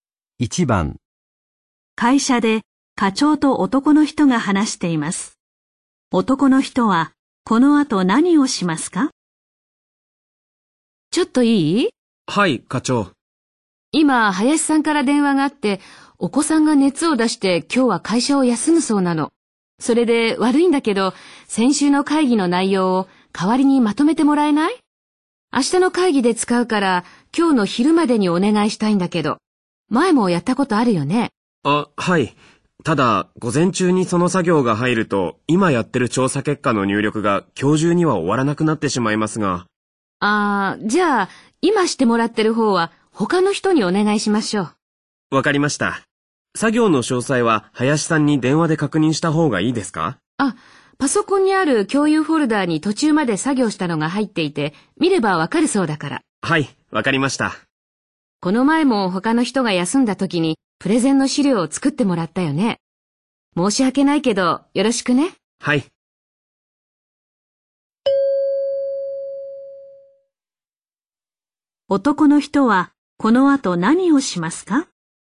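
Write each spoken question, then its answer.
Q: 男の人はこの後何をしますか?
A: 先週の会議の内容をまとめる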